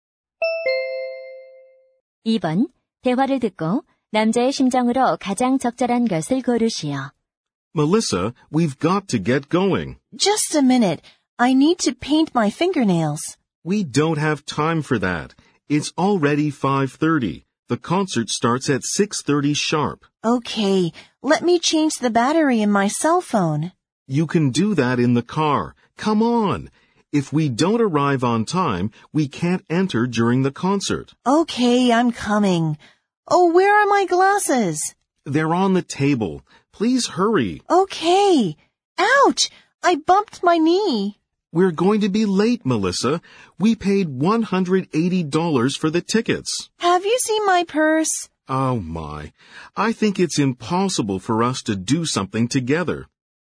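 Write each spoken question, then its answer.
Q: 대화를 듣고 남자의 심정으로 가장 적절한 것을 고르시오.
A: 답답하고 짜증남 (frustrated)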